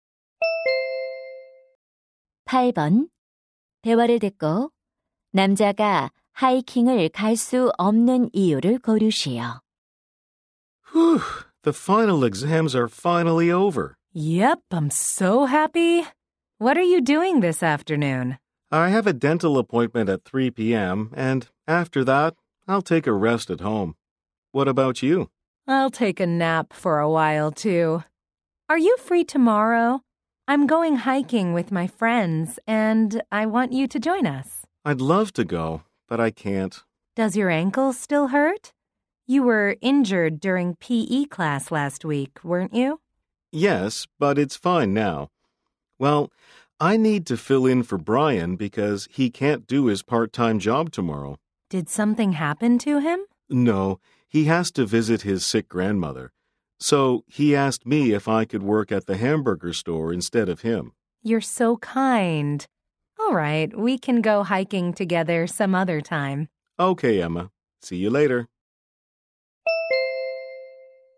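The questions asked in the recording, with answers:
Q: 대화를 듣고 남자가 하이킹을 갈 수 없는 이유를 고르시오.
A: 친구 대신 아르바이트를 해야 해서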